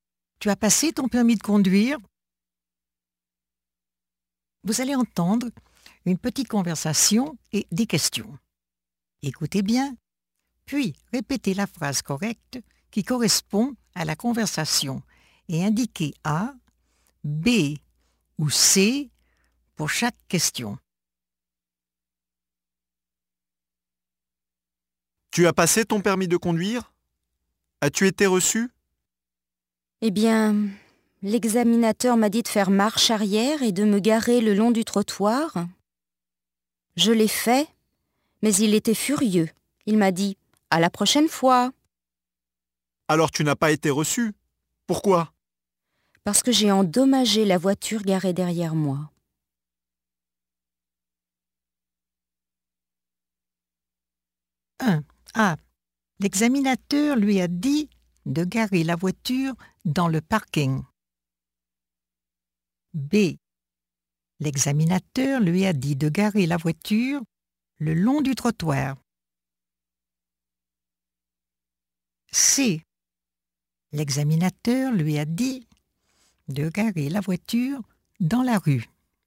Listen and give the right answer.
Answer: B. L'examinateur lui a dit de garer la voiture le long du trottoir.